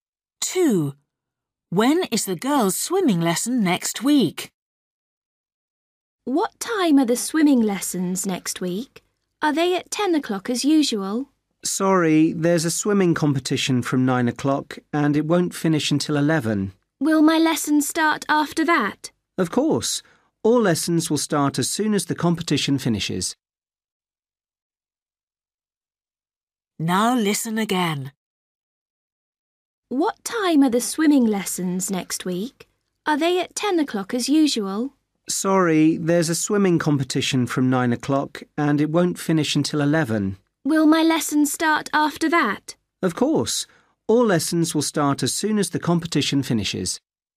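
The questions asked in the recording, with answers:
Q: When is the girls' swimming lesson next week?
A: At 11 o'clock, after the competition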